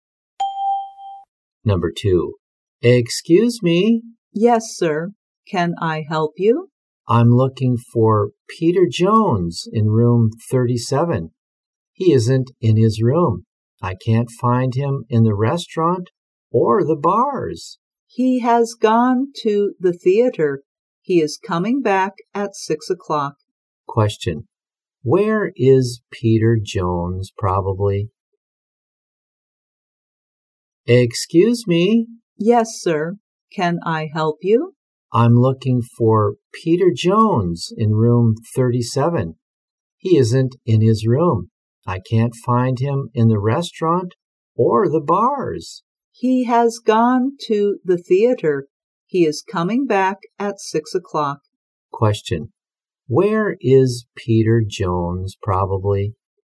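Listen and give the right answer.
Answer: At the theater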